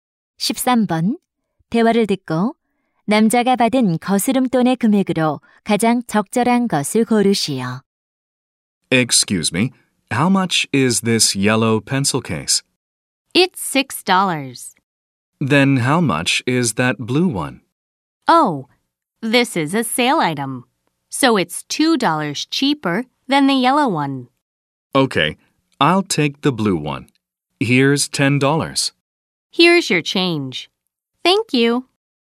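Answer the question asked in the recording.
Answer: 6달러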